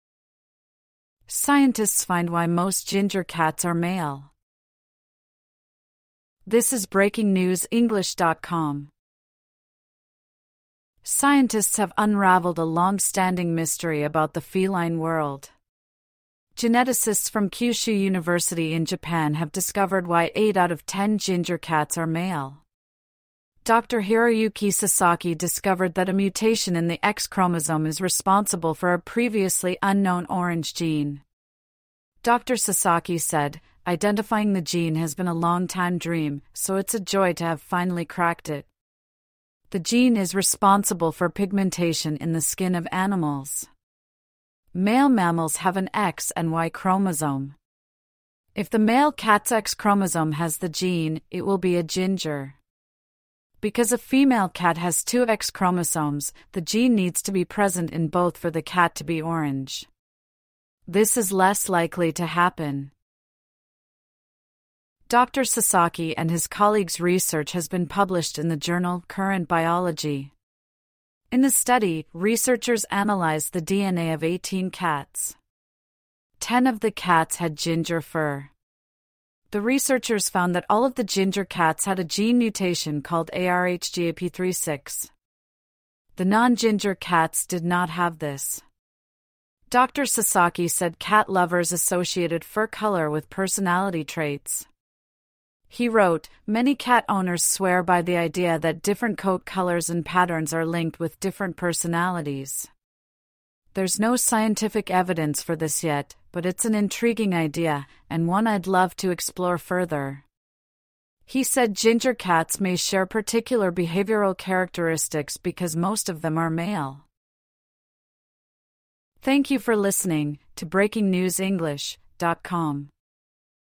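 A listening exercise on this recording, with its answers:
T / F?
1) Scientists have solved a mystery that surfaced earlier this year.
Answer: F

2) The orange colour of ginger cats comes from a gene mutation.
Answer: T

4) If female cat has a gene mutation in two X chromosomes, it'll be ginger.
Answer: T

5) The study has been published in a journal called "Current Biology".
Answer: T

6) All of the ginger cats in a study had the gene mutation.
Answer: T

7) Cat lovers believe fur colour is related to cats' personalities.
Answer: T

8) There's a lot of research about cats' fur colour and personality.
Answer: F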